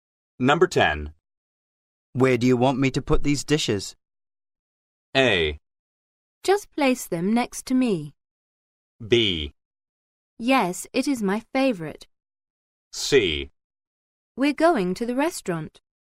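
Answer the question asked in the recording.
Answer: A: Just place them next to me.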